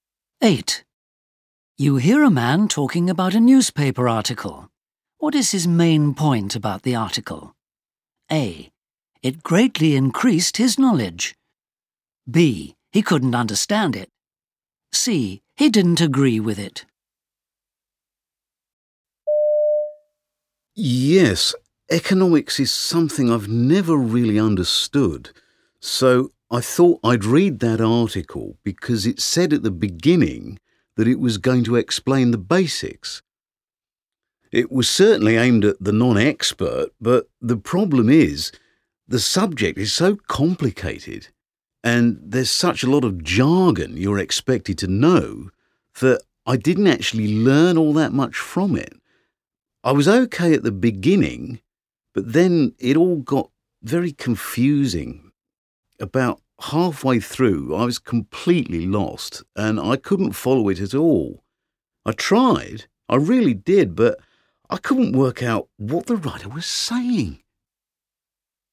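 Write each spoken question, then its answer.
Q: What is his main point about the article?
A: B: He couldn't understand it.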